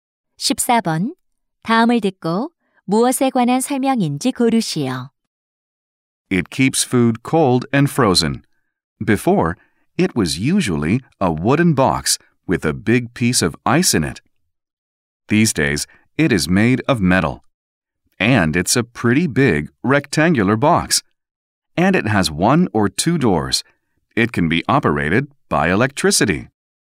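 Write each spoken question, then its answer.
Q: 다음을 듣고 무엇에 관한 설명인지 고르시오.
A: 냉장고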